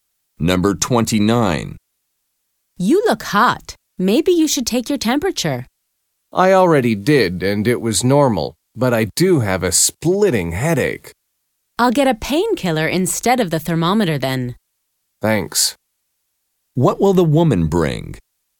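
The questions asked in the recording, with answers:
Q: What will the woman bring?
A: A painkiller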